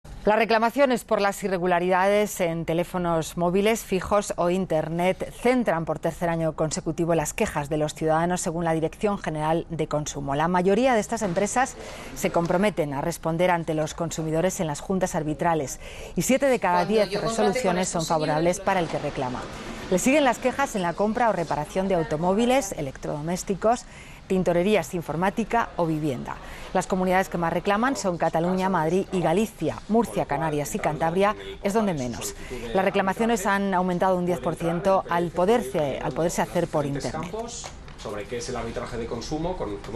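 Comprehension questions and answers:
Escucha y explica qué se dice sobre los siguientes temas.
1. teléfonos móviles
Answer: Las irregularidades en teléfonos móviles, fijos o Internet son, por tercer año consecutivo, el motivo principal de las quejas.

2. el 70%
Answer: 7 de cada 10 resoluciones de las juntas arbitrales son favorables para el que reclama.

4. Canarias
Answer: Es una de las comunidades que menos reclaman, con Murcia y Cantabria.

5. acceso por Internet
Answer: Las reclamaciones han aumentado un 10% porque se pueden hacer por Internet.

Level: 中级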